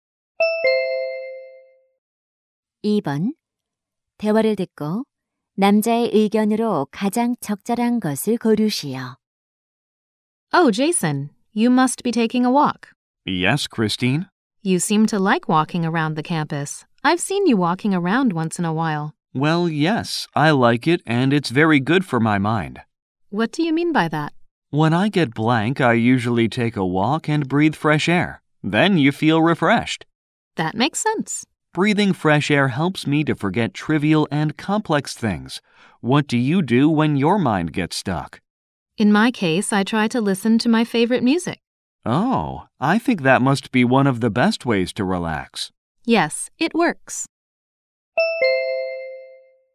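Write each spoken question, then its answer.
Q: 대화를 듣고 남자의 의견으로 가장 적절한 것을 고르시오.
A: 산책은 머리를 상쾌하게 하는 데 도움이 된다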